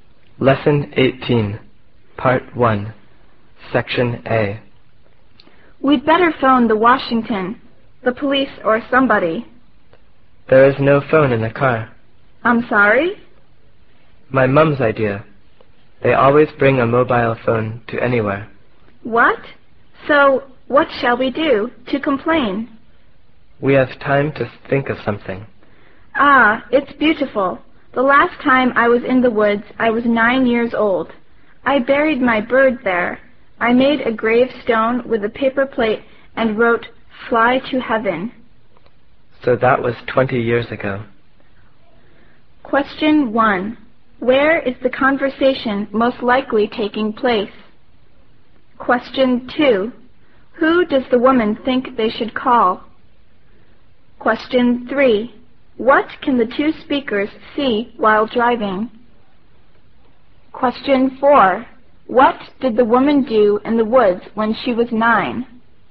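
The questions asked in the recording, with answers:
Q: What did the woman do in the woods when she was 9?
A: She buried her bird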